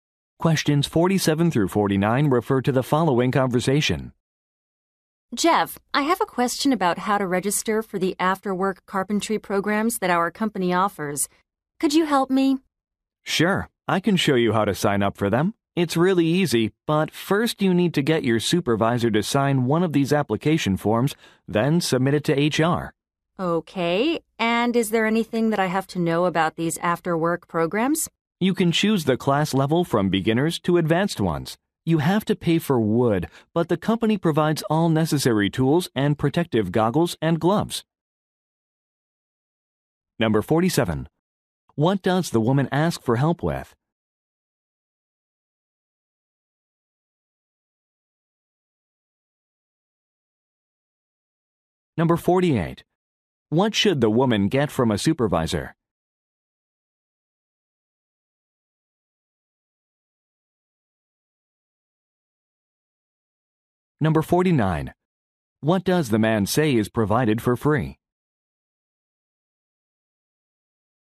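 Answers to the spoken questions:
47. Registering for after-work carpentry programs
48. A signature on an application form
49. Tools, goggles and gloves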